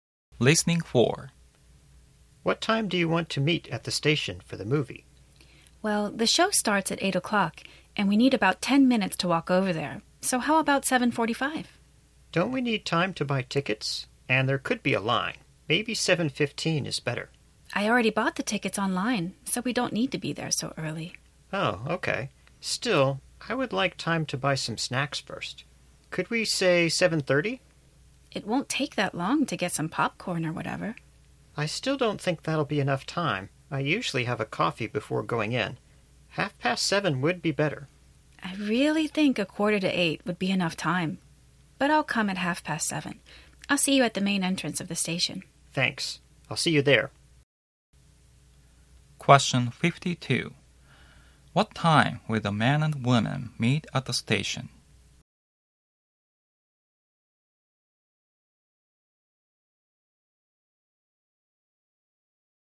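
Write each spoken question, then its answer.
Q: What time will the man and woman meet at the station?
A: 7:30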